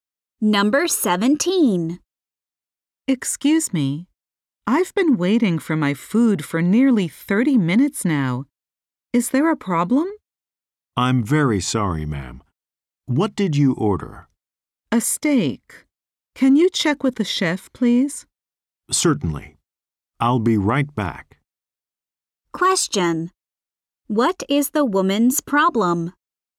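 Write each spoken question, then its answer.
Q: What is the woman's problem?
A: Her steak still hasn't come after nearly 30 minutes.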